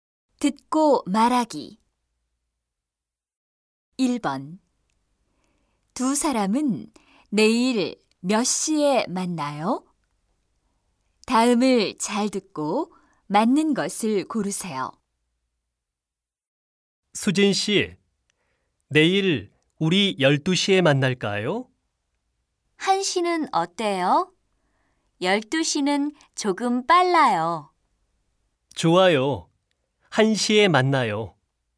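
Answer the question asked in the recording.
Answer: 1시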